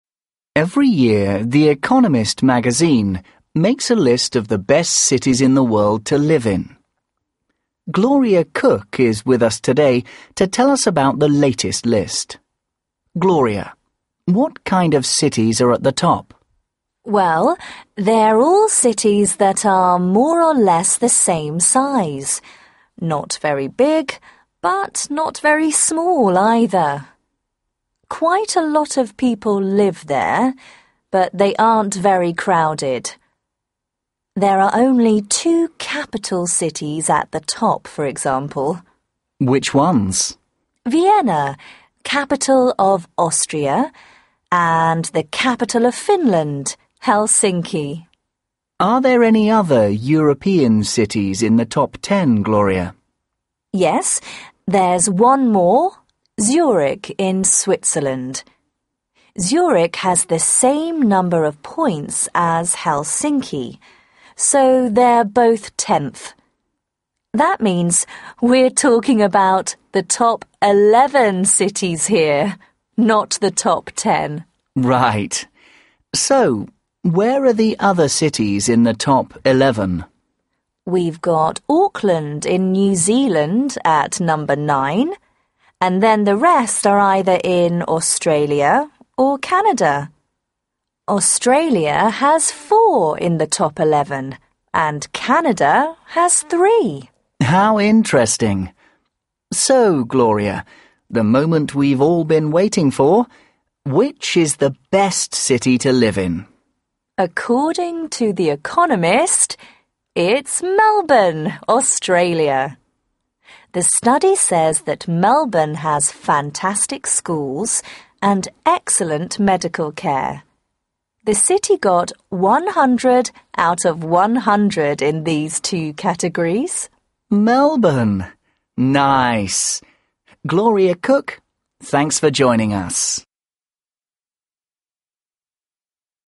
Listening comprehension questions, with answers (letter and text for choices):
2. Listen to a radio programme about the best city to live in. Choose the correct answer, A, B or C.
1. According to the study by The Economist, the best cities to live in are all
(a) capital cities.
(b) cities where only a few people live.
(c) medium-sized cities.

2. In this particular list,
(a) Helsinki is in a higher position than Zurich.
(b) Zurich and Helsinki are in the same position.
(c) Helsinki is lower then Zurich.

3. The country with the most cities in the top ten is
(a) Australian.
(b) Canada.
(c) New Zealand.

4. Melbourne gets full marks in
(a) health and environment.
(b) transport and health.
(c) health and education.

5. The aim of the radio programme is to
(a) describe the best cities that people live in.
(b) inform listeners about the best cities to live in.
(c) encourage listeners to vote on the best cities to live in.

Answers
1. (c) medium-sized cities.
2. (b) Zurich and Helsinki are in the same position.
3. (a) Australian.
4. (c) health and education.
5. (b) inform listeners about the best cities to live in.

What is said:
Presenter Every year, The Economist magazine makes a list of the best cities in the world to live in. Gloria Cooke is with us today to tell us about the latest list. Gloria, what kind of cities are at the top?
Gloria Well, they're all cities that are more or less the same size: not very big, but not very small, either. Quite a lot of people live there, but they aren't very crowded. There are only two capital cities at the top, for example.
p Which ones?
g Vienna, capital of Austria, and the capital of Finland: Helsinki.
p Are there any other European cities in the top ten, Gloria?
g Yes, there's one more: Zurich in Switzerland. Zurich has the same number of points as Helsinki, so they're both tenth. That means we're talking about the top eleven cities here, not the top ten.
p Right. So, where are the other cities in the top eleven?
g We've got Auckland in New Zealand at number nine, and then the rest are either in Australia or Canada. Australia has four in the top eleven and Canada has three.
p How interesting! So, Gloria, the moment we've all been waiting for: which is the best city to live in?
g According to The Economist, it's Melbourne, Australia. The study says that Melbourne has fantastic schools and excellent medical care – the city got 100 out of 100 in these two categories.